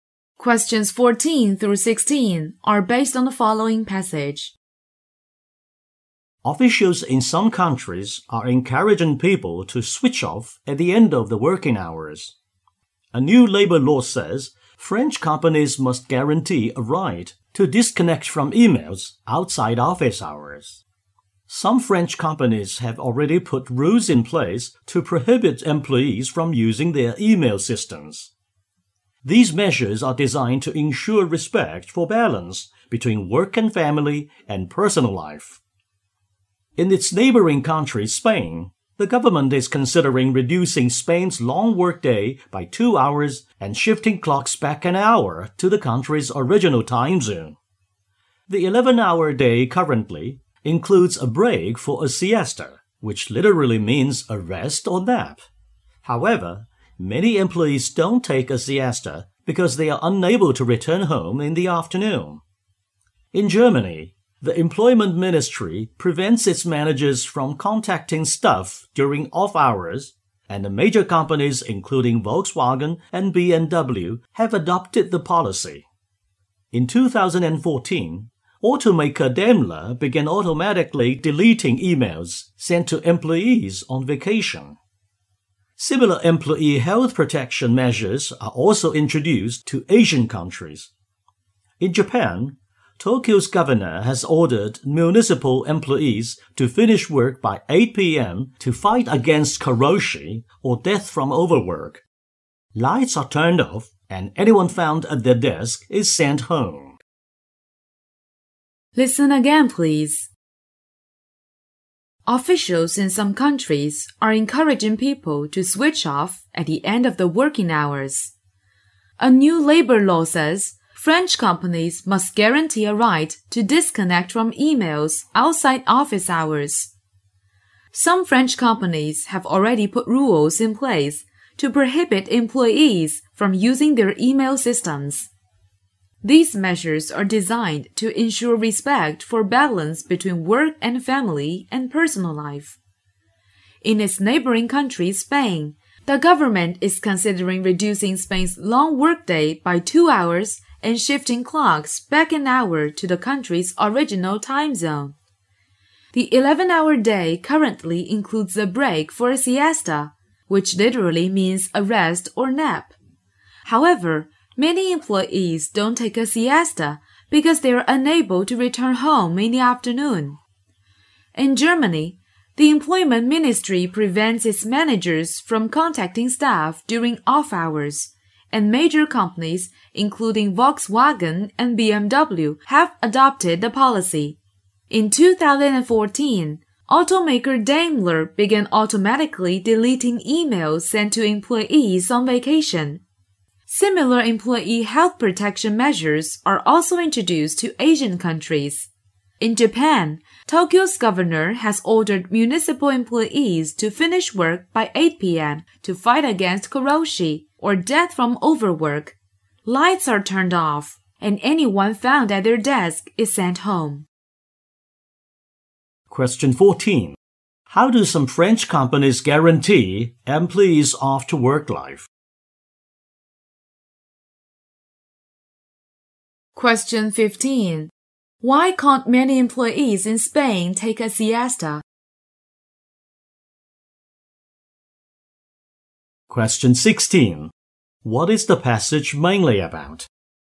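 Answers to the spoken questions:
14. By forbidding employees to use their email outside office hours
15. They can't return home in the afternoon
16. Measures in several countries to limit working hours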